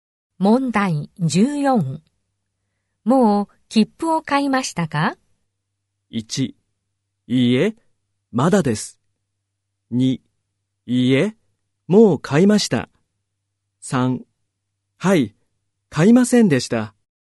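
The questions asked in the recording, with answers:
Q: もう切符を買いましたか?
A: 1: いいえ、まだです。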